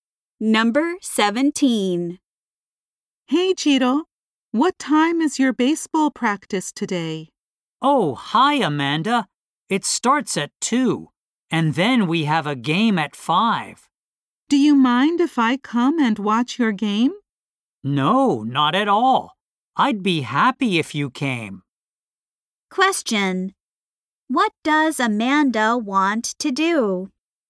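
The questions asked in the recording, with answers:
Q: What does Amanda want to do?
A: Watch Chito's baseball game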